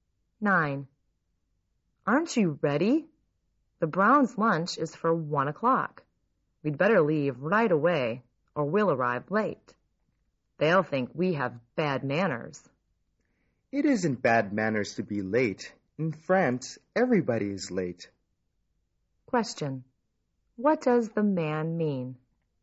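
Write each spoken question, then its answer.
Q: What does the man mean?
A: It isn't bad manners to be late, so there's no need to hurry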